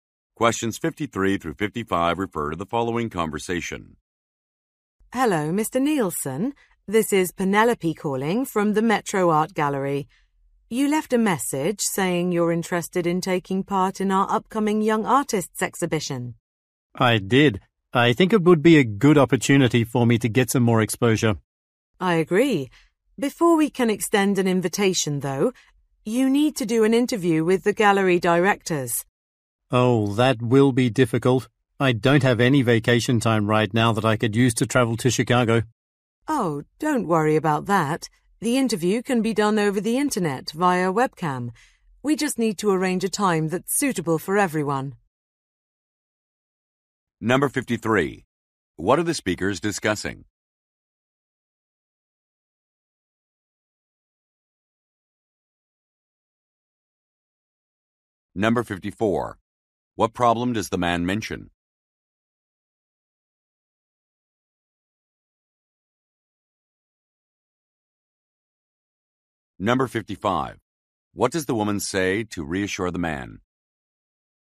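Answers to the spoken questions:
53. Taking part in an art exhibition
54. He has no vacation time to travel to Chicago
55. The interview can be done online via webcam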